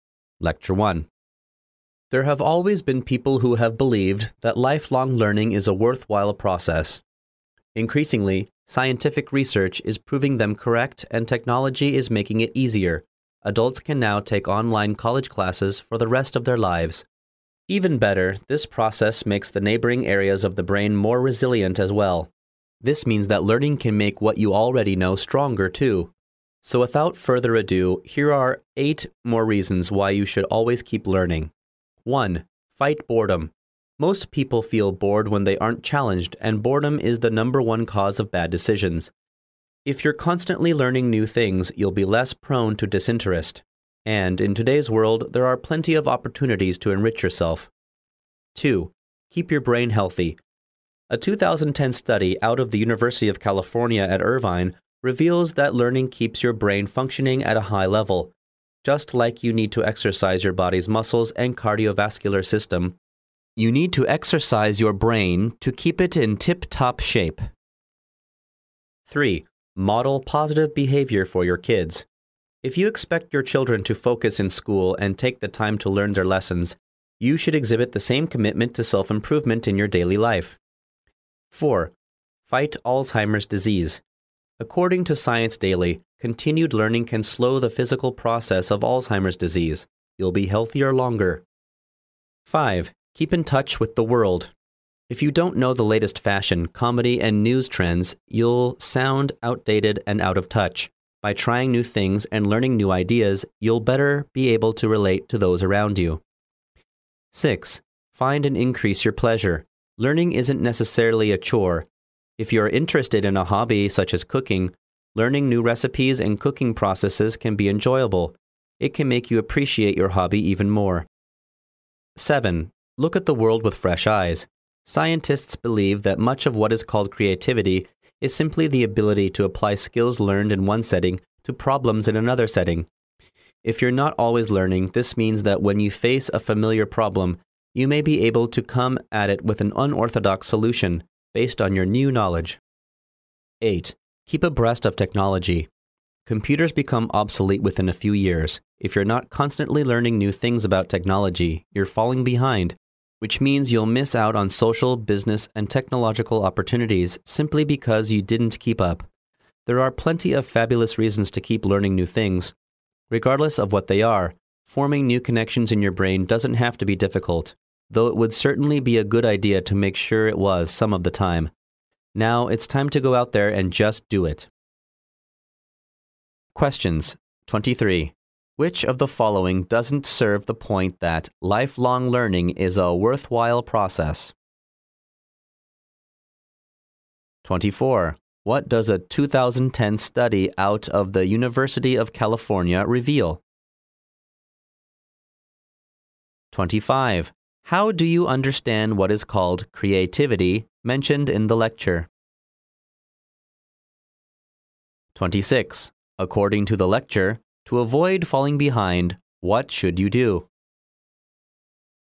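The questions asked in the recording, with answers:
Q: What does a 2010 study out of the University of California reveal?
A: Learning keeps your brain functioning at a high level

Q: How do you understand what is called creativity mentioned in the lecture?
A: The ability to apply skills learned in one setting to problems in another setting

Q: According to the lecture, to avoid falling behind, what should you do?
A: Keep learning new things about technology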